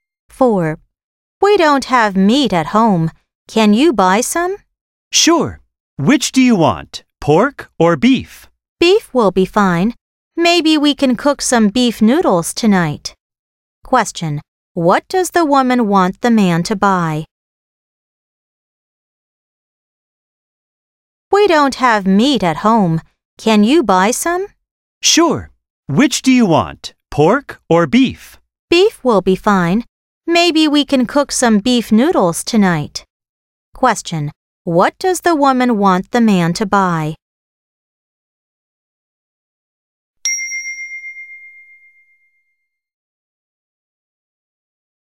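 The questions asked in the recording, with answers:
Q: What does the woman want the man to buy?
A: beef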